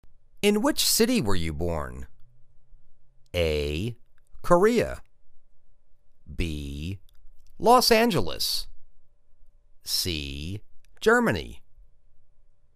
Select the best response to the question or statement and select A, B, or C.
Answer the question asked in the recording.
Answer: Los Angeles.